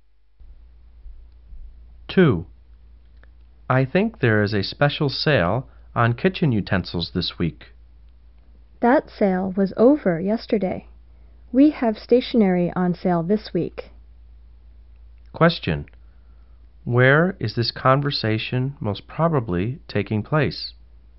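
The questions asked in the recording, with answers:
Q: Question. Where is this conversation most probably taking place?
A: In a store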